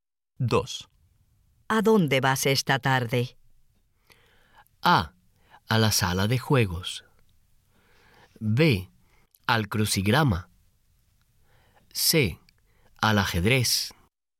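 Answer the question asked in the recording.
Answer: A: A la sala de juegos.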